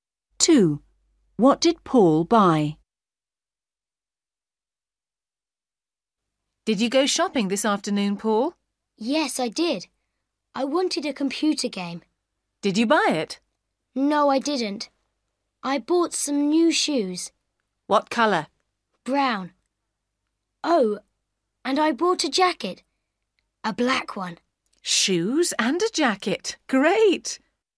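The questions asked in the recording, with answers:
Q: What did Paul buy?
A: Brown shoes and a black jacket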